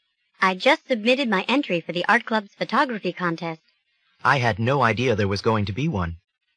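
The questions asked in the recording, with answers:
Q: What does the man mean?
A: He didn't know there was a photography contest.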